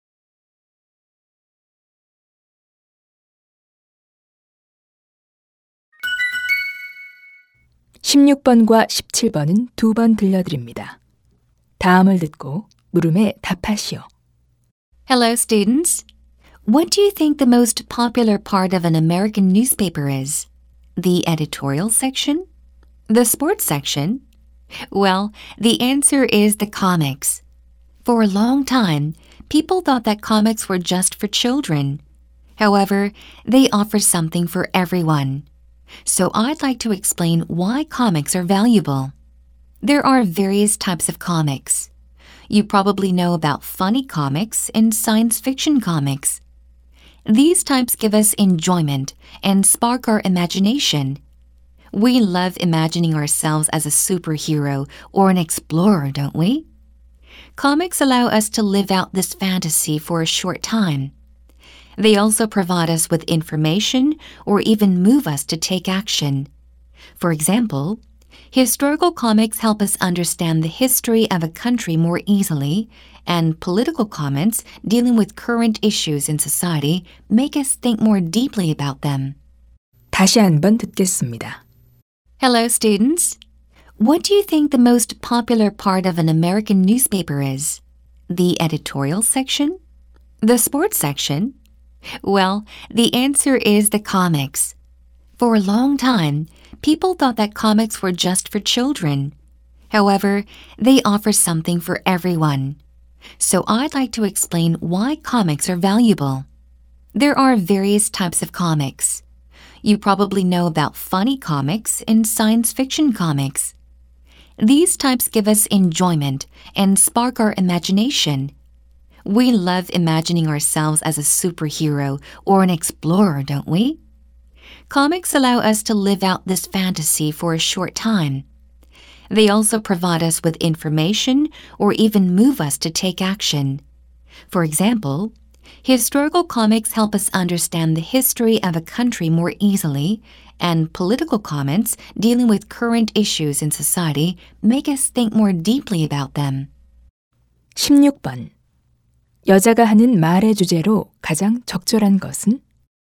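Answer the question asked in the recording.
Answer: 만화의 가치(만화가 가치 있는 이유)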